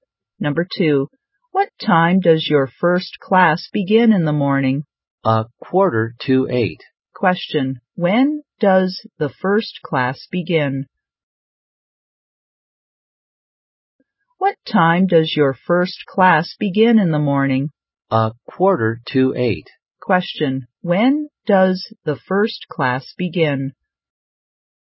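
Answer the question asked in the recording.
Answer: At a quarter to eight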